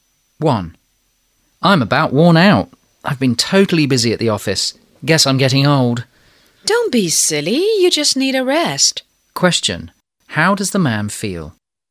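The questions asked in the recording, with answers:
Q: How does the man feel?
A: Very tired / worn out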